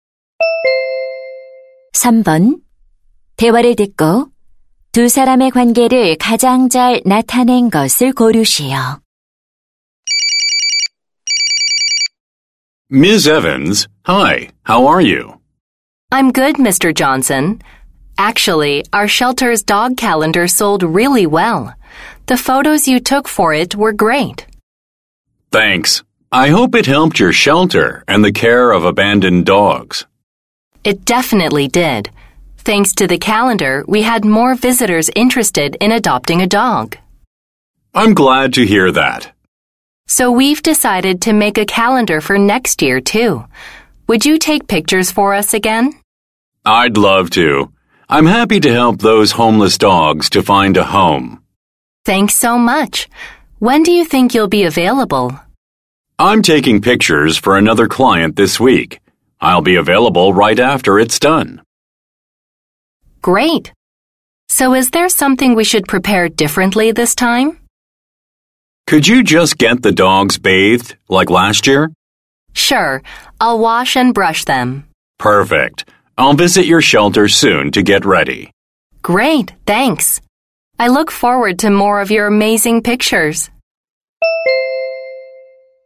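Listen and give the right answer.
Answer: 유기견 보호소 직원 - 사진작가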